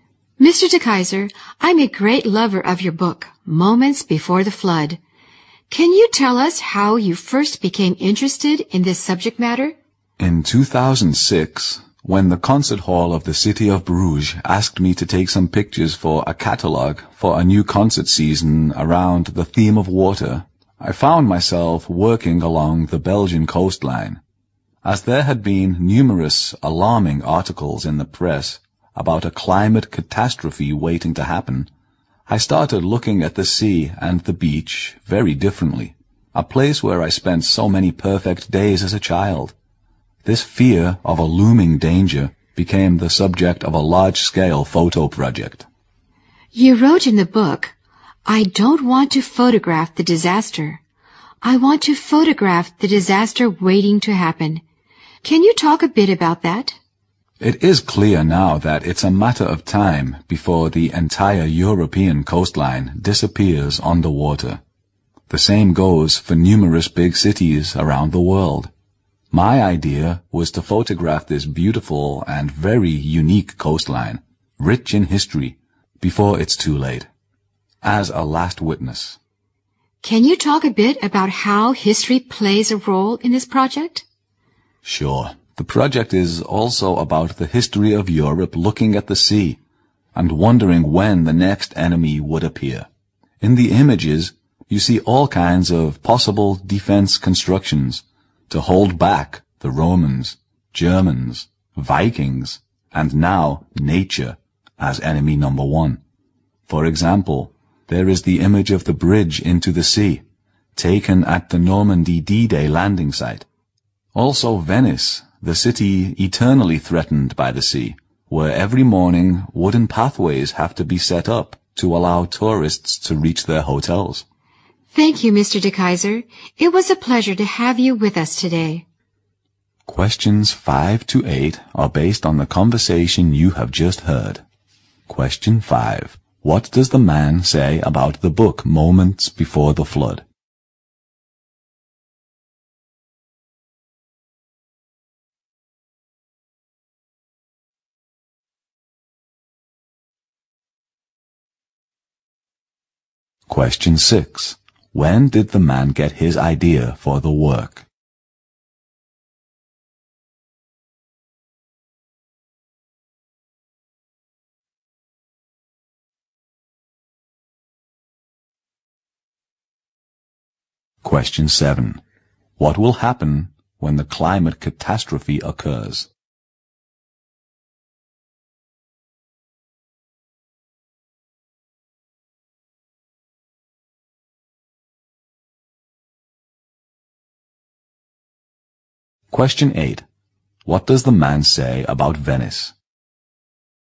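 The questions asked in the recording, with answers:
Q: When did the man get his idea for the work?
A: In 2006, while photographing the Belgian coastline for a concert hall catalogue

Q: What will happen when the climate catastrophe occurs?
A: The entire European coastline will disappear underwater

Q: What does the man say about Venice?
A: It is eternally threatened by the sea; wooden pathways are set up every morning for tourists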